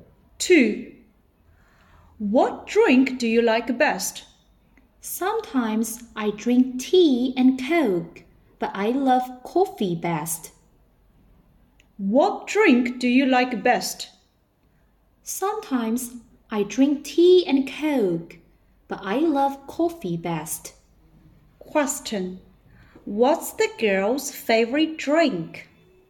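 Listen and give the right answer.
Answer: Coffee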